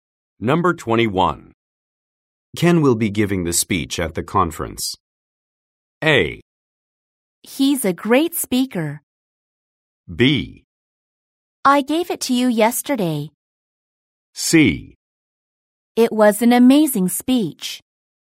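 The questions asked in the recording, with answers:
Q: Ken will be giving the speech at the conference.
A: A: He's a great speaker.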